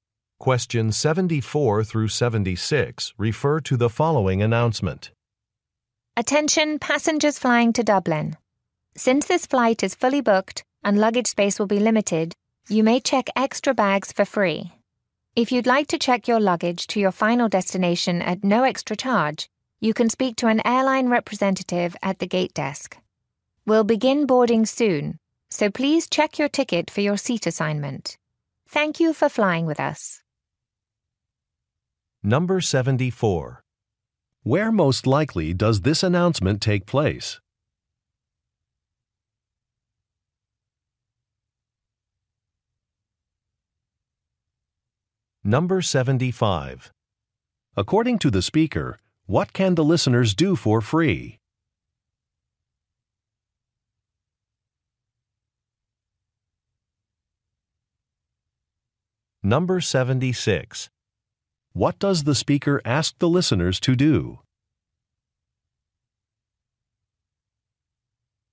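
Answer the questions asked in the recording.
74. At an airport gate
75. Check extra bags
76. Check their tickets for seat assignments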